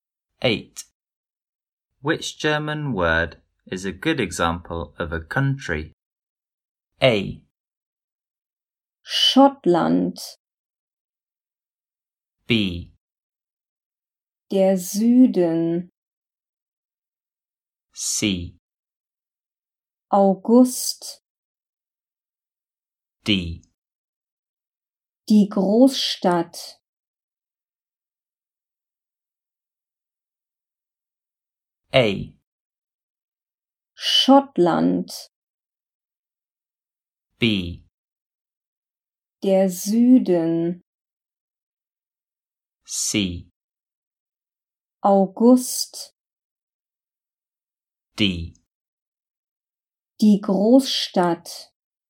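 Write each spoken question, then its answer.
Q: Which German word is a good example of a country?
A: A: Schottland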